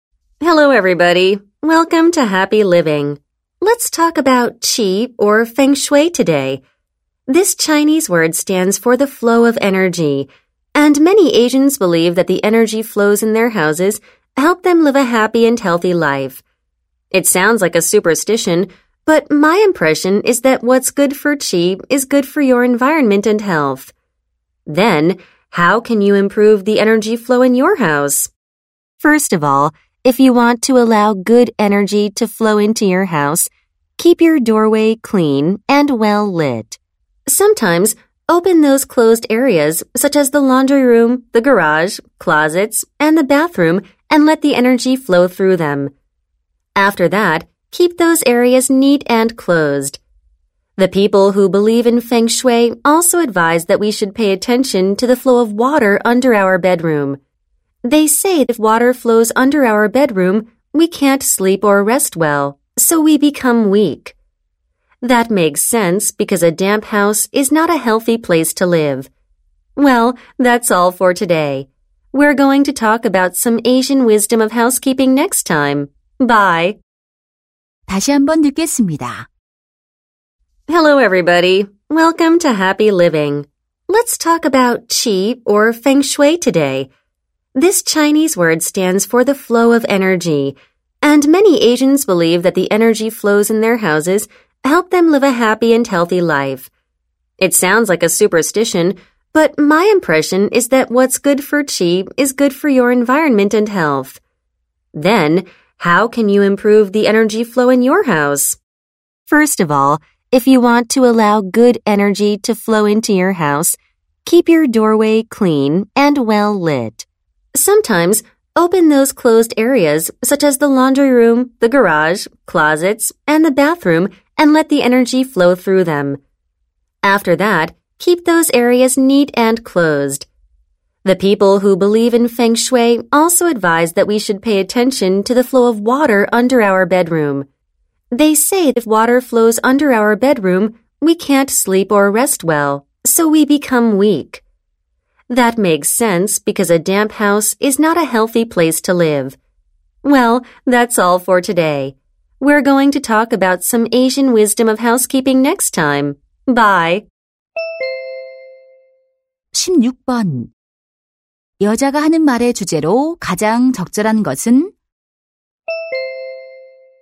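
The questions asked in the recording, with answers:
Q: 여자가 하는 말의 주제로 가장 적절한 것은?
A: 풍수에 따라 집 안의 에너지 흐름을 개선하는 방법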